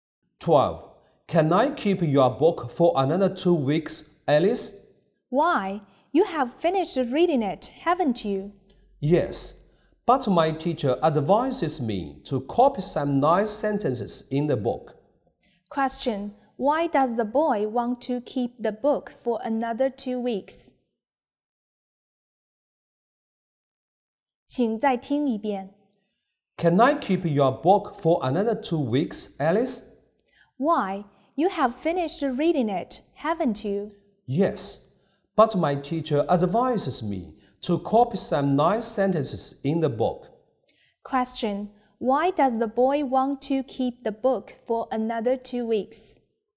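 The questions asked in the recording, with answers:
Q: Why does the boy want to keep the book for another 2 weeks?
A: To copy some nice sentences in the book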